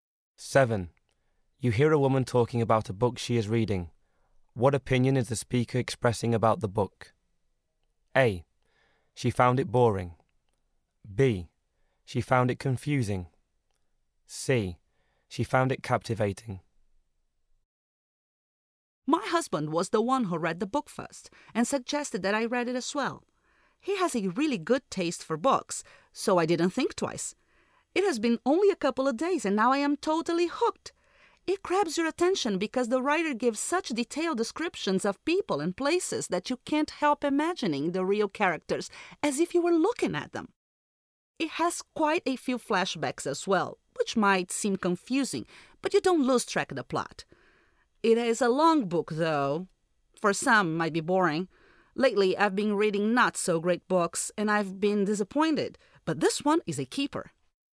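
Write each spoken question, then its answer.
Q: What opinion is the speaker expressing about the book?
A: C: She found it captivating.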